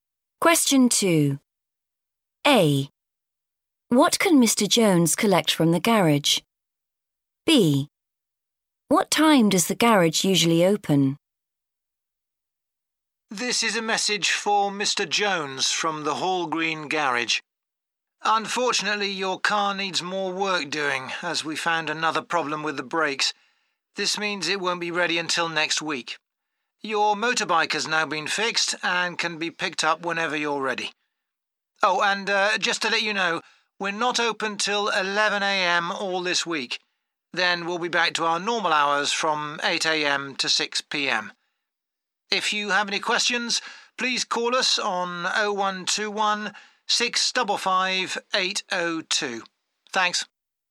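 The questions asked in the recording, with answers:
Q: What can Mr. Jones collect from the garage?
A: his motorbike

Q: What time does the garage usually open?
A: 8 a.m.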